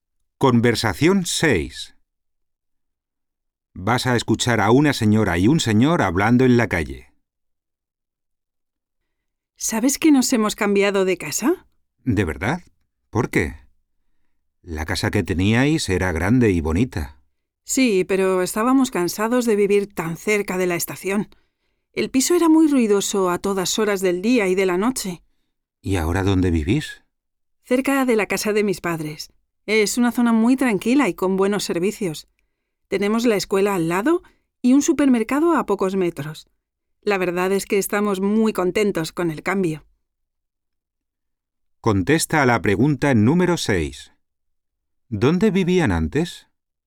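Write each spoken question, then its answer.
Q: ¿Dónde vivían antes?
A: Cerca de la estación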